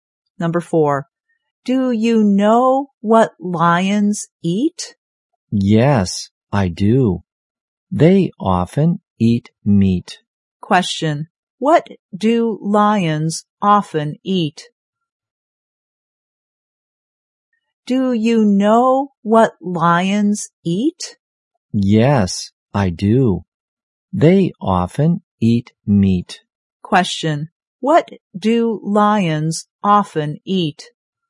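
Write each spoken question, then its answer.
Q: what do lions often eat?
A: Meat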